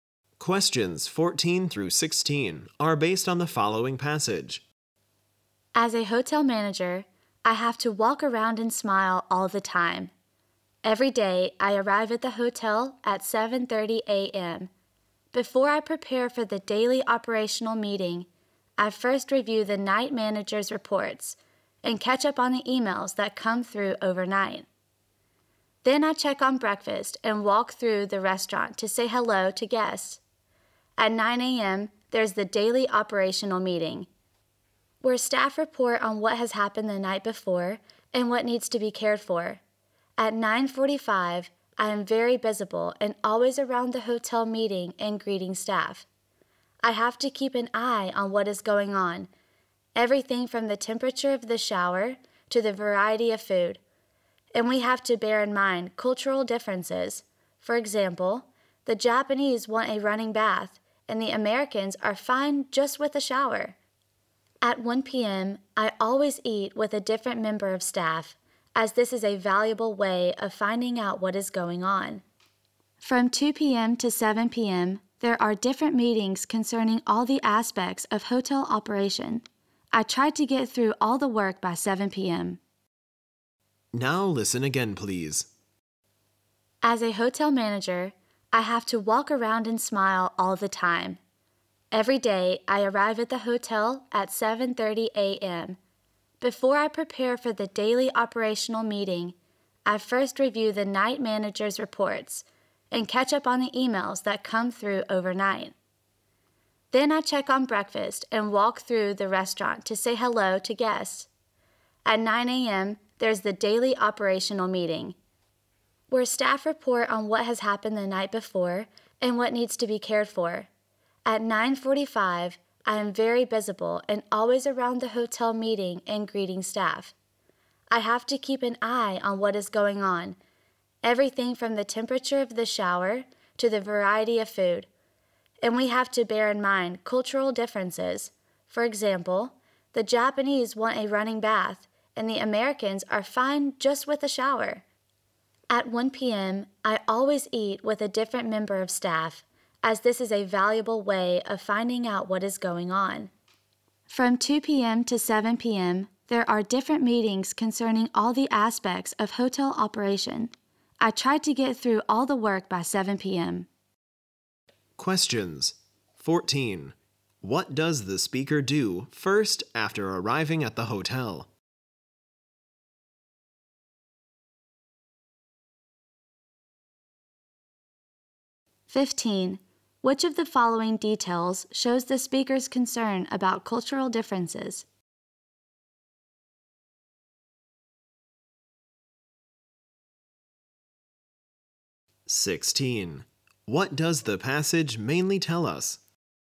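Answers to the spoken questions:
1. Reviews the night manager's reports
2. The Japanese want a running bath, while Americans are fine with a shower
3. A hotel manager's working day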